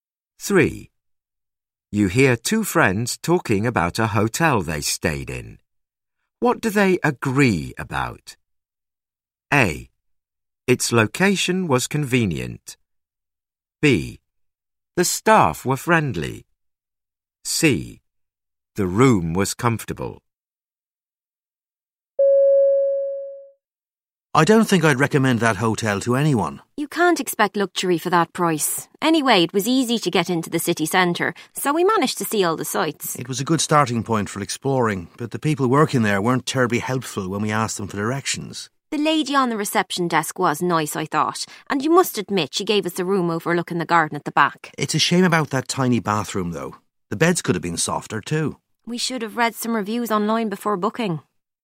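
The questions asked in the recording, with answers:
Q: What do they agree about?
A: A: Its location was convenient.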